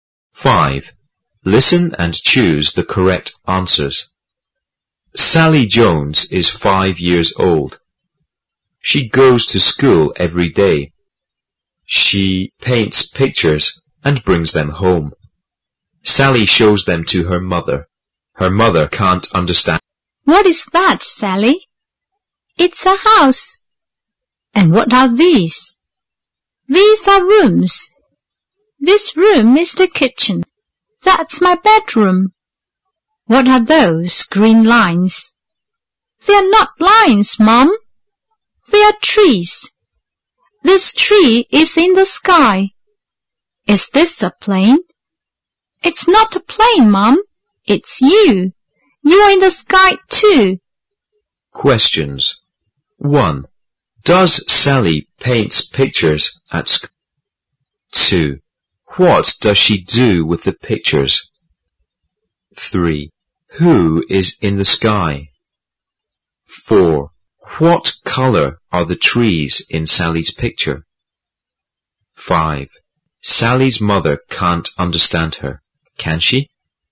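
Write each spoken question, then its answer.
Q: Does Sally paint pictures at school?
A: Yes, she does.

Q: What does she do with the pictures?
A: She brings them home and shows them to her mother.

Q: Who is in the sky?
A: Her mother.

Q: What color are the trees in Sally's picture?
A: Green.

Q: Sally's mother can't understand her, can she?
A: No, she can't.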